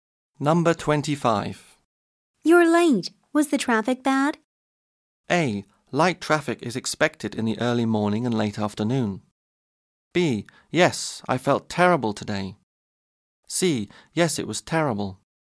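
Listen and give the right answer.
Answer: C: Yes, it was terrible.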